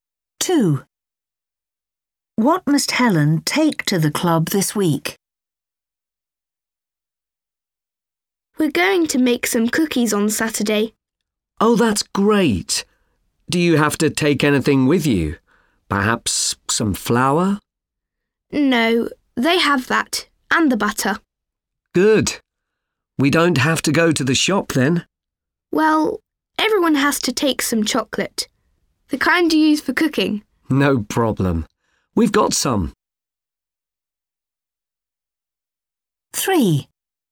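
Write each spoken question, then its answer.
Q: What must Helen take to the club this week?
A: chocolate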